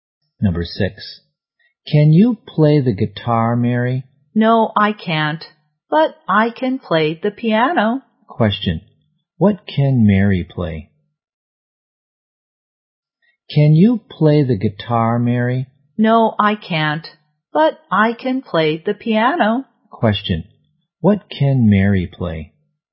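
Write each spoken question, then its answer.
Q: Question What can Mary play?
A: The piano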